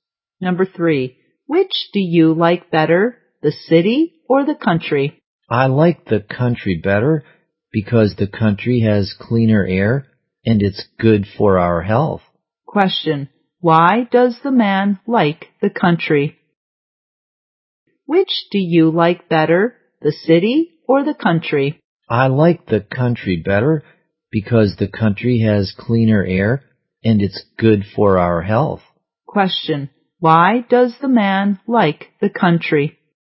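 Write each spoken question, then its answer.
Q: Question, why does the man like the country?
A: It has cleaner air and is good for health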